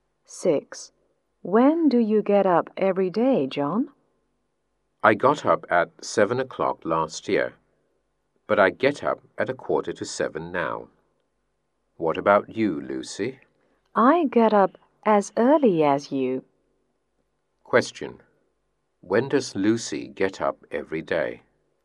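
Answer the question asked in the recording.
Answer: At 6:45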